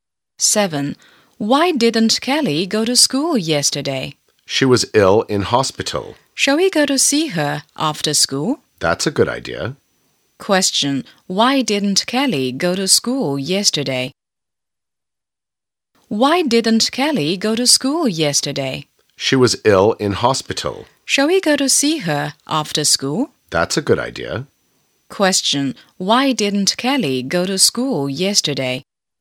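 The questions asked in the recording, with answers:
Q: Why didn't Kelly go to school yesterday?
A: She was ill in hospital.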